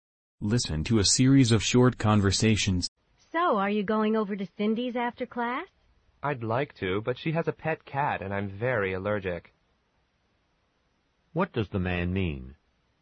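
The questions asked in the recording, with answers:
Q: What does the man mean?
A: He probably won't go to Cindy's because he is allergic to her cat.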